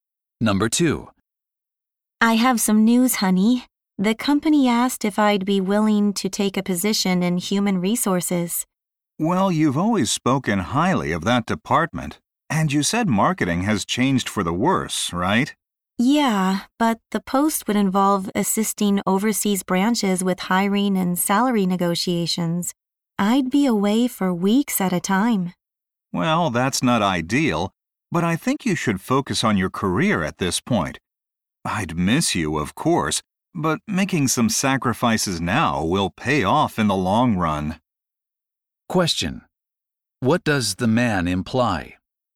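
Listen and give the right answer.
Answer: The woman should accept the human resources position even though she would be away a lot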